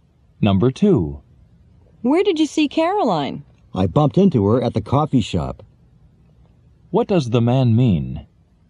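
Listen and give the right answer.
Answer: He met Caroline by chance at the coffee shop.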